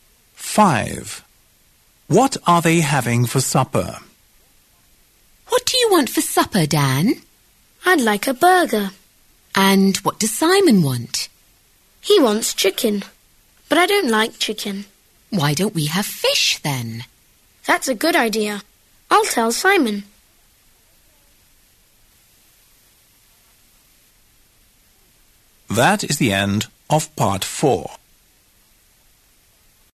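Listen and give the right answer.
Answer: Fish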